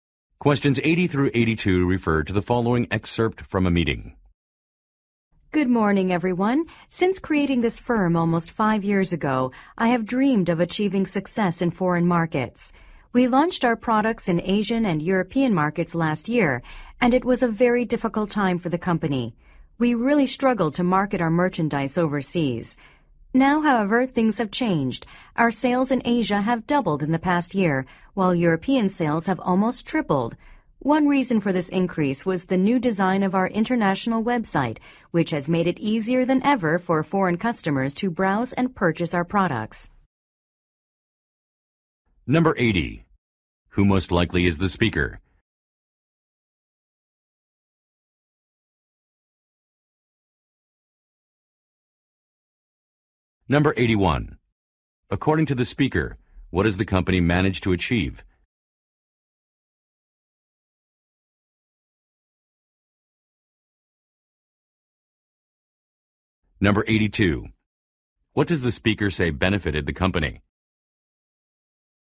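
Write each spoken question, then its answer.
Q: Who most likely is the speaker?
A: The company's founder

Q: According to the speaker, what has the company managed to achieve?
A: Higher sales in foreign markets

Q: What does the speaker say benefited the company?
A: The redesigned international website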